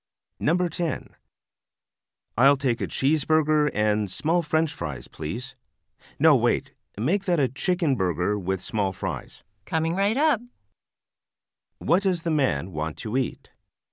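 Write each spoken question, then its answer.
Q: What does the man want to eat?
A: A chicken burger with small fries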